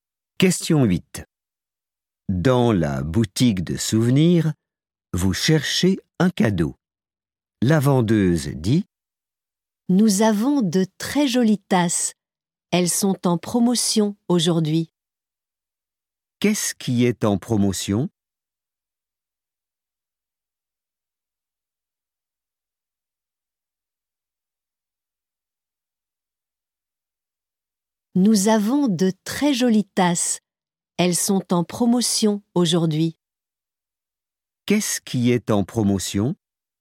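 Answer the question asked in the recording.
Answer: Les tasses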